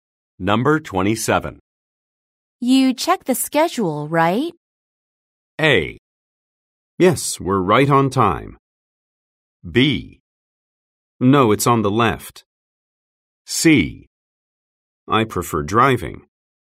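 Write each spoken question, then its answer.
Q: You check the schedule, right?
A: A: Yes, we're right on time.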